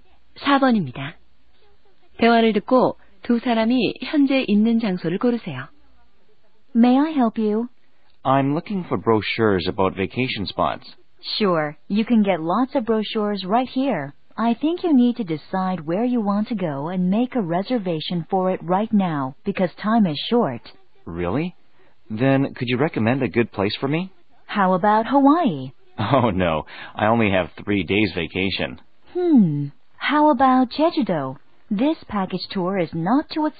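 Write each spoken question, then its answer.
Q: 대화를 듣고 두 사람이 현재 있는 장소를 고르세요.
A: 여행사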